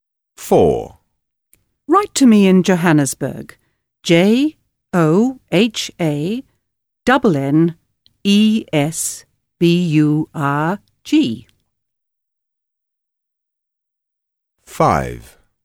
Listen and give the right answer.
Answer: Johannesburg